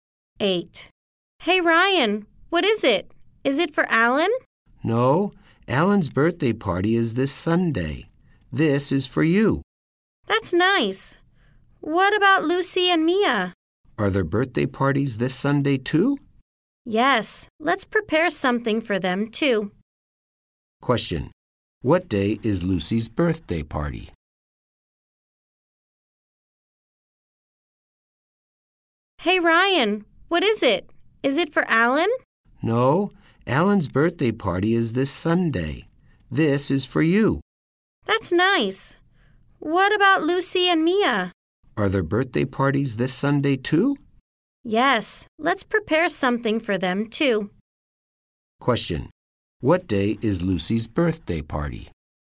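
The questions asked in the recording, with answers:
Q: What day is Lucy's birthday party?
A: Sunday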